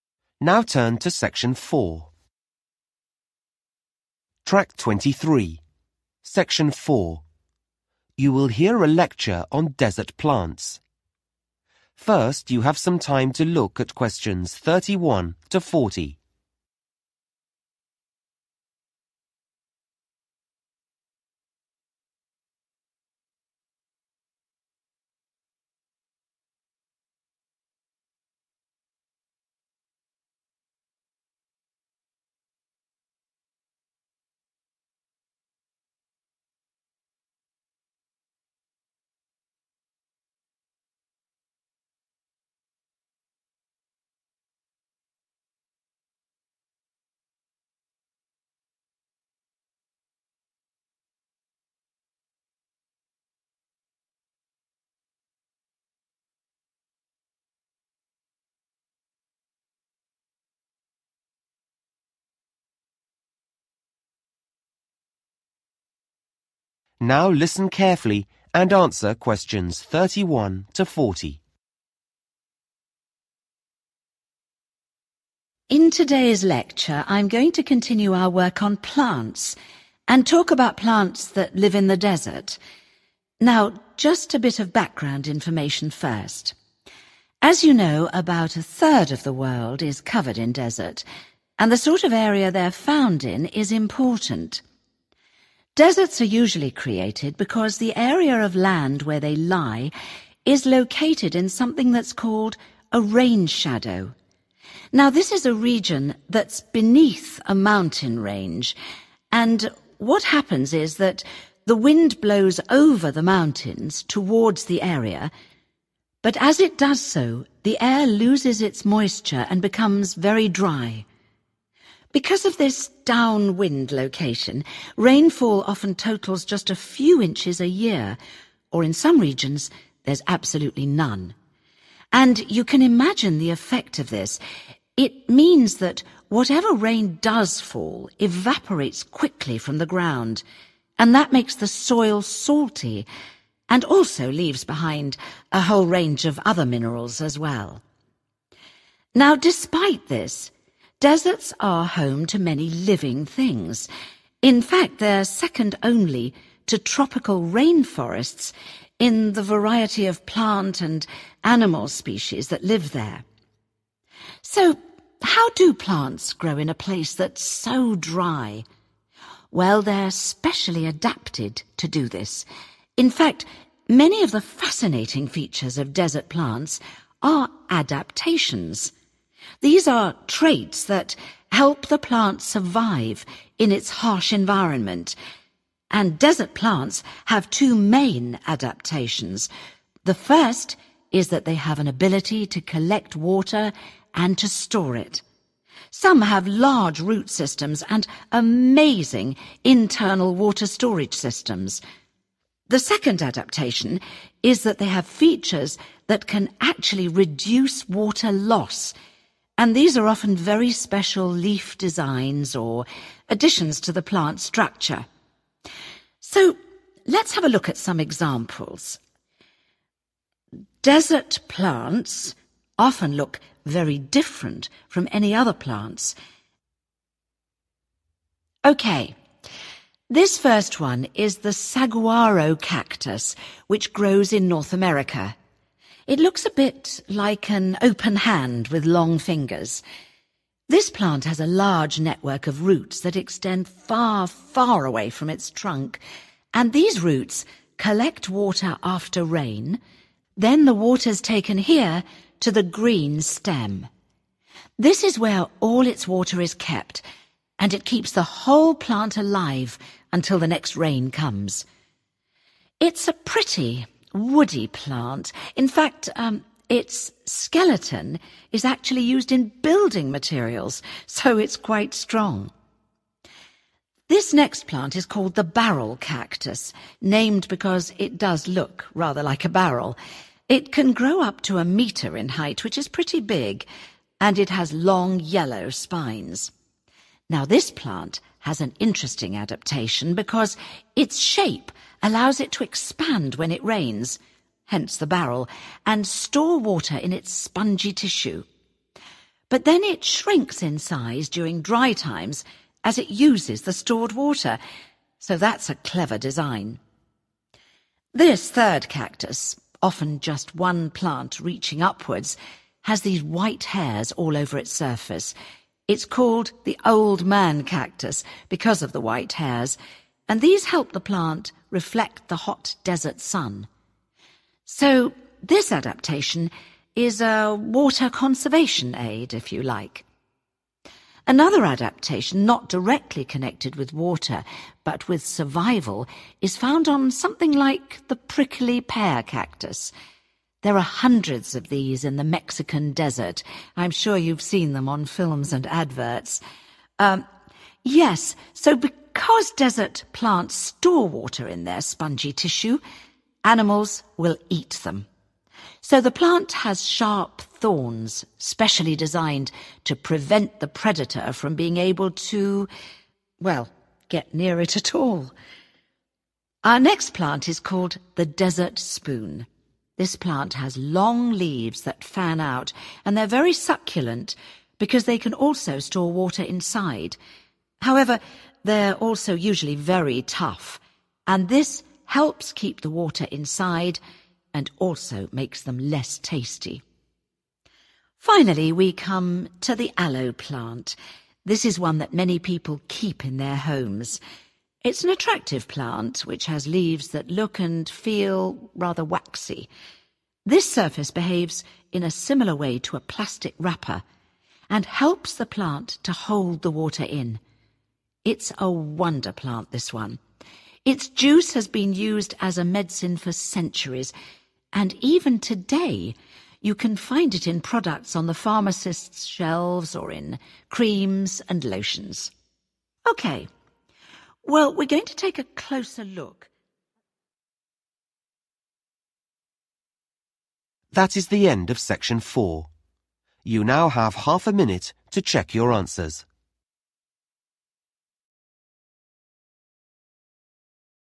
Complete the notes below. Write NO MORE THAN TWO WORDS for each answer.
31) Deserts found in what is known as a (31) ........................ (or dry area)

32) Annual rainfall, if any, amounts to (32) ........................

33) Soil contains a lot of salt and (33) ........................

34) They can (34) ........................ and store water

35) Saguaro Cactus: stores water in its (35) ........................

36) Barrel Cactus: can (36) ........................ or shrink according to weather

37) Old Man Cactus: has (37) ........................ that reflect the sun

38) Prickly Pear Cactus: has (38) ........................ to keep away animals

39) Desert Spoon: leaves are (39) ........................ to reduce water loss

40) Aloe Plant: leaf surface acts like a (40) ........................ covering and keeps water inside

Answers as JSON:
{"31": "rain shadow", "32": "inches", "33": "(other) minerals", "34": "collect", "35": "(green) stem", "36": "expand", "37": "white hairs", "38": "(sharp) thorns", "39": "(very) tough", "40": "plastic"}